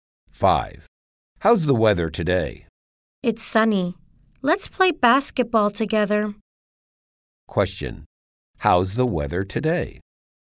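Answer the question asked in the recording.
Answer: Sunny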